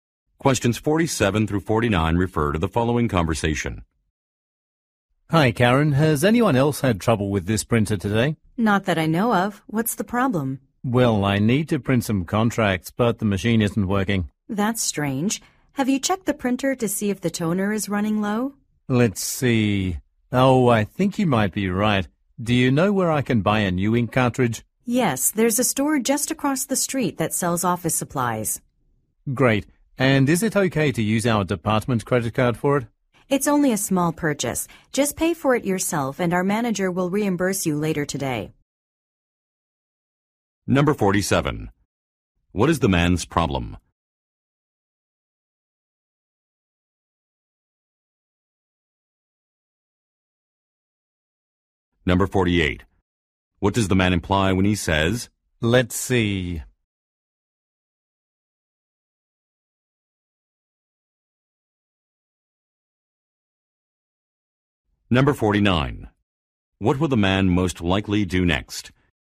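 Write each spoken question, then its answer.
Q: What is the man's problem?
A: The printer isn't working

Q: What does the man imply when he says,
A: He will check the printer's toner

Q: What will the man most likely do next?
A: Buy a new ink cartridge at a store across the street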